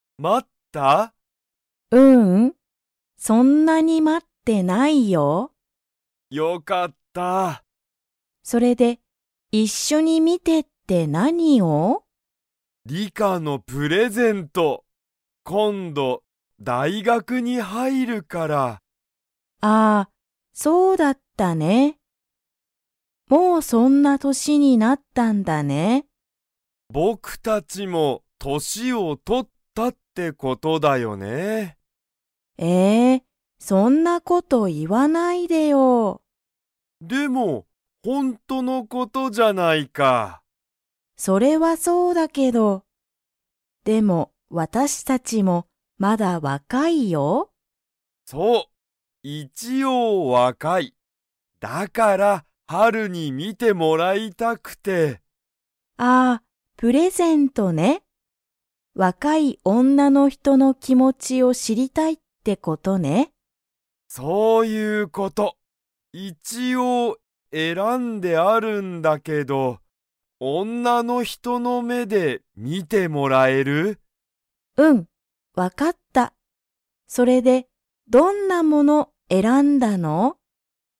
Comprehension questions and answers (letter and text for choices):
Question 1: ユタカは、誰(だれ)にプレゼントを買(か)いたいですか?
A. リカ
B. ハル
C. 友達(ともだち)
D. 母(はは)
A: A. リカ

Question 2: リカは今度(こんど)、____に入(はい)る。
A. 会社(かいしゃ)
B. お店(みせ)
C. 大学(だいがく)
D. 家(いえ)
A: C. 大学(だいがく)

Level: Level 2